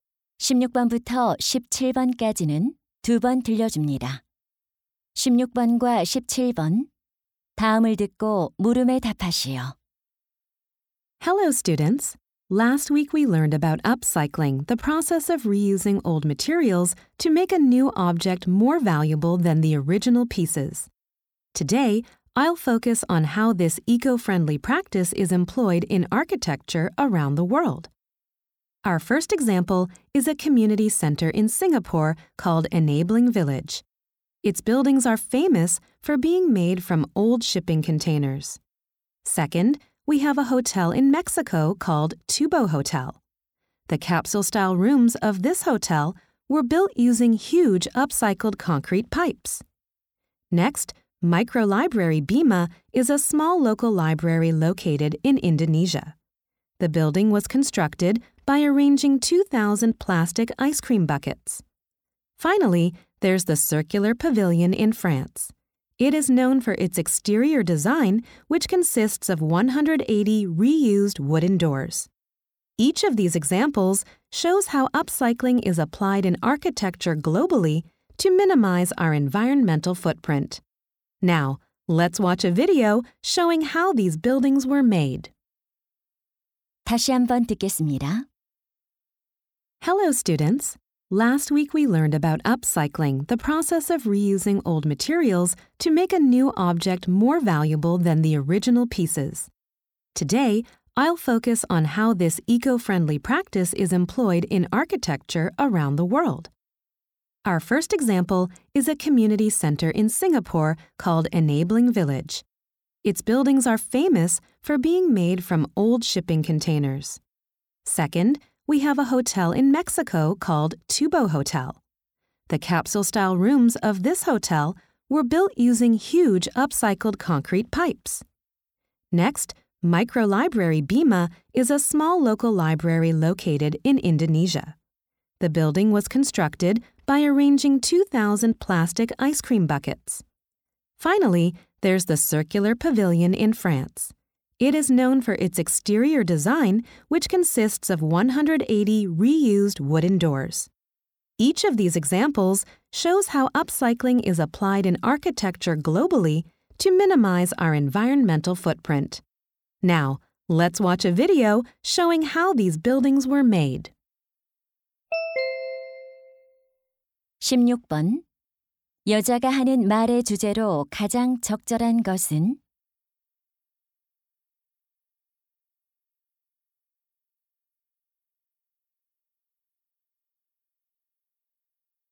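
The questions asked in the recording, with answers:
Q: 여자가 하는 말의 주제로 가장 적절한 것은?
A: 세계 여러 건축물에 적용된 업사이클링 사례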